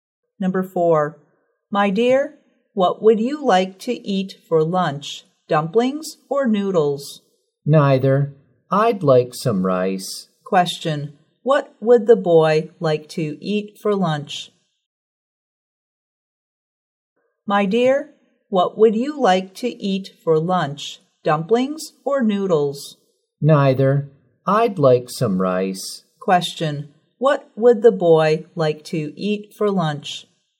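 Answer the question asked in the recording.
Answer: Rice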